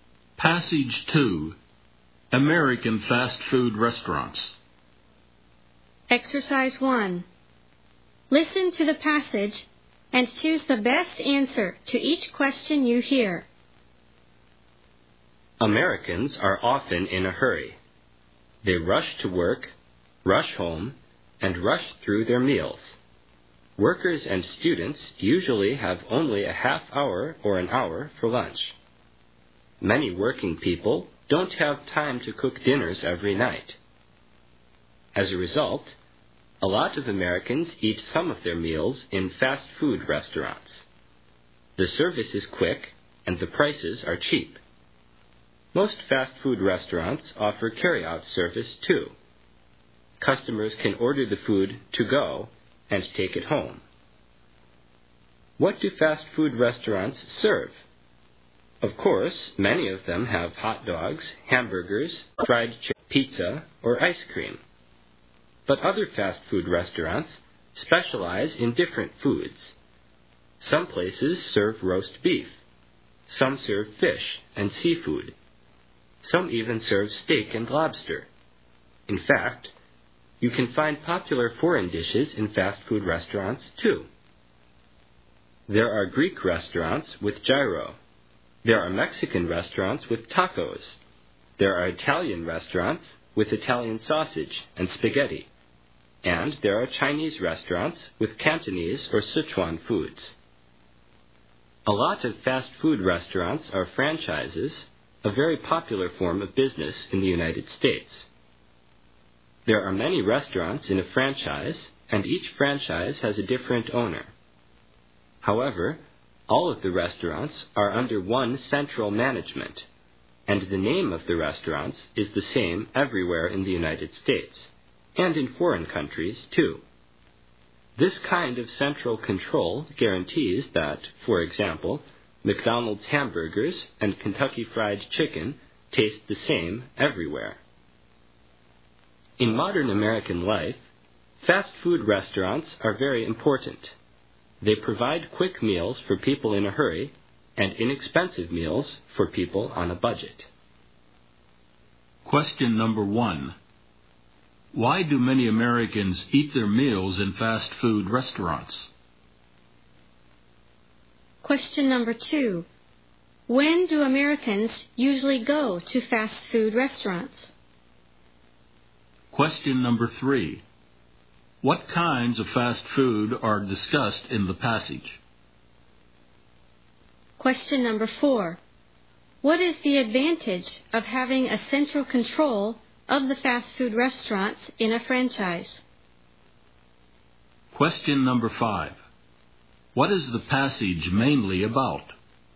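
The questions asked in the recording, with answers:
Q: Why do many Americans eat their meals in fast food restaurants?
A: They are in a hurry; the service is quick and the prices are cheap.

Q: What is the advantage of having a central control of the fast food restaurants in a franchise?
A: It guarantees the food tastes the same everywhere.

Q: What is the passage mainly about?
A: American fast food restaurants.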